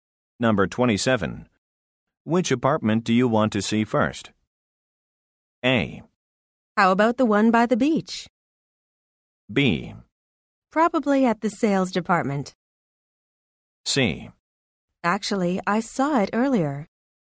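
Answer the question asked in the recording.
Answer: A: How about the one by the beach?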